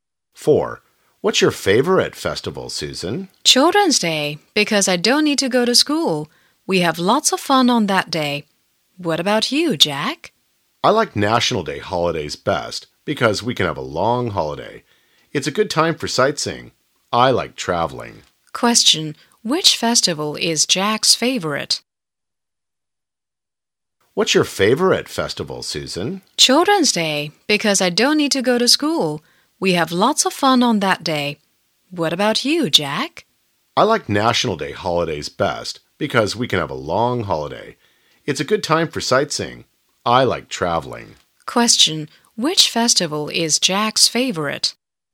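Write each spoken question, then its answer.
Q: Question, which festival is Jack's favorite?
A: National Day holidays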